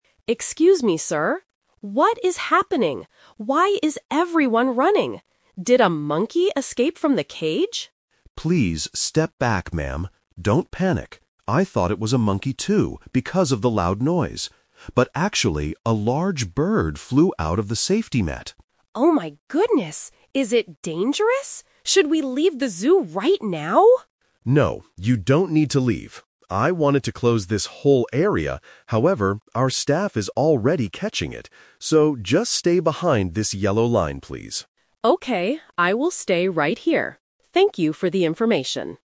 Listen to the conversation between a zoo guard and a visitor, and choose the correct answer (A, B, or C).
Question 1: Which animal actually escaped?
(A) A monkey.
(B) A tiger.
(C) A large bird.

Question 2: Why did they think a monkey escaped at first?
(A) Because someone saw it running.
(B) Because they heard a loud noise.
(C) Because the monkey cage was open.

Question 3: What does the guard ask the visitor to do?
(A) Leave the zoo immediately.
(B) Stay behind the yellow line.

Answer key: 1C, 2B, 3B

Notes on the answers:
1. The guard clarifies, "actually, a large bird flew out of the safety net." Option (A) is the trap; the visitor asked if a monkey escaped, and the guard admitted he thought it was a monkey at first, but it wasn't (The Twist). Option (B) is a dangerous animal but is not mentioned in the audio.
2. The guard says, "I thought it was a monkey too, because of the loud noise." Options (A) and (C) are plausible reasons for an animal escaping, but they are not mentioned.
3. The guard gives the final instruction: "So, just stay behind this yellow line, please." Option (A) is the trap; the visitor asks if they should leave the zoo, but the guard says, "No, you don't need to leave." Option (C) is not mentioned and is dangerous in real life.

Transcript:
Visitor: Excuse me, sir. What is happening? Why is everyone running? Did a monkey escape from the cage?
Guard: Please step back, ma'am. Don't panic. I thought it was a monkey too, because of the loud noise. But actually, a large bird flew out of the safety net.
Visitor: Oh my goodness! Is it dangerous? Should we leave the zoo right now?
Guard: No, you don't need to leave. I wanted to close this whole area, however, our staff is already catching it. So, just stay behind this yellow line, please.

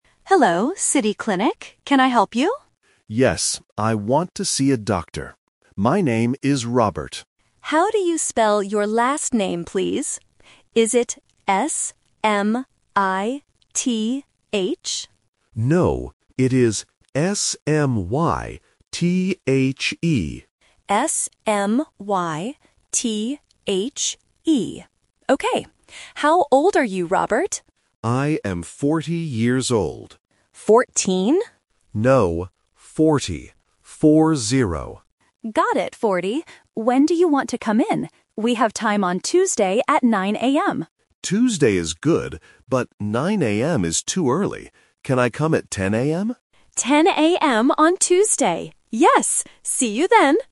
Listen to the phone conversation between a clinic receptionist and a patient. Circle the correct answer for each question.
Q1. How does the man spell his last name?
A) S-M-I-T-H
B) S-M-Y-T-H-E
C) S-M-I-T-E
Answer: B

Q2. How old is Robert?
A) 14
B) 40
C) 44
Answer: B

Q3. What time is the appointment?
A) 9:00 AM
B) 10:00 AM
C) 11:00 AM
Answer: B

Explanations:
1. Robert spells his last name clearly as "S-M-Y-T-H-E". Option (A) S-M-I-T-H is the trap because the receptionist guesses this common spelling, but Robert says "No". Option (C) is a plausible name but is never mentioned.
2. Robert states he is "40 years old" and repeats "Four-zero". Option (A) 14 is the trap because the receptionist mishears him (a common A1 listening mistake: -teen vs -ty). Option (C) 44 is not mentioned.
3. Robert asks, "Can I come at 10:00 AM?" and the receptionist confirms it. Option (A) 9:00 AM is the trap because the receptionist offers this time first, but Robert says it is "too early". Option (C) 11:00 AM is not mentioned.

